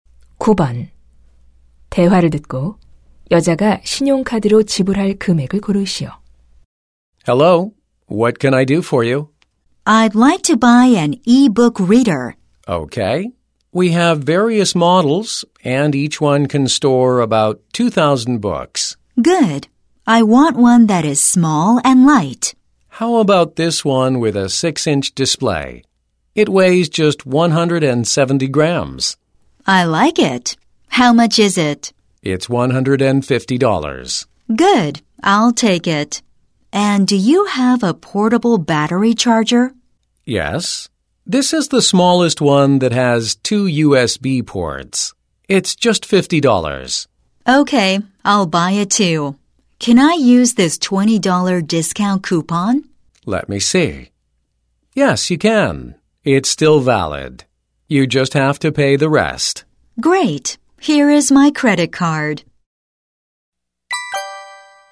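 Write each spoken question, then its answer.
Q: 대화를 듣고 여자가 신용카드로 지불할 금액을 고르시오.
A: $180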